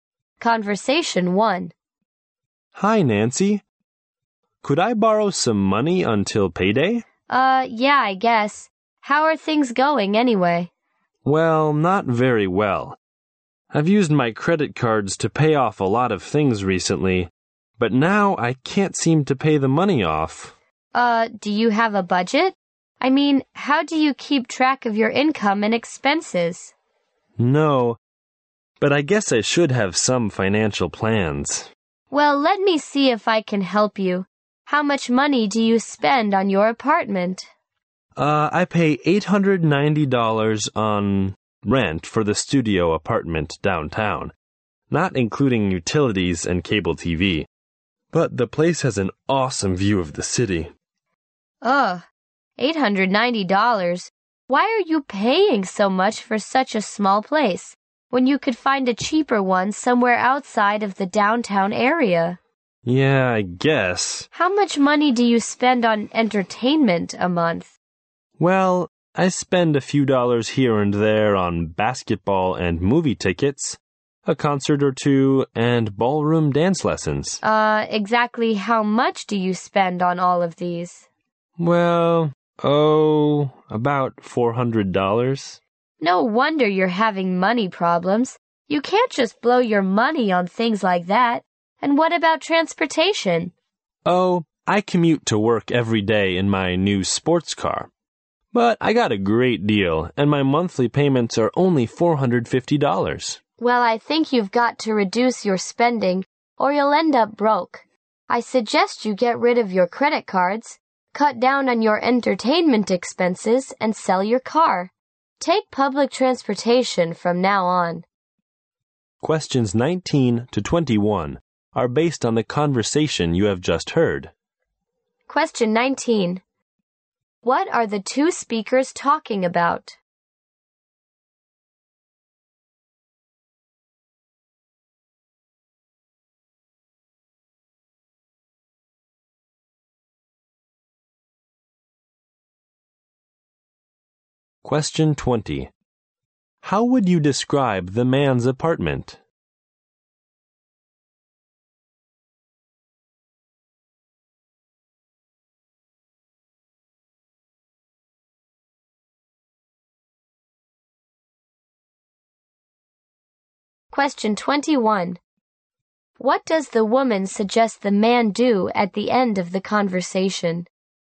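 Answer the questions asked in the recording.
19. The man's money problems and how he should budget.
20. A small, expensive downtown studio with a great view.
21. Get rid of his credit cards, spend less on entertainment, sell his car and take public transport.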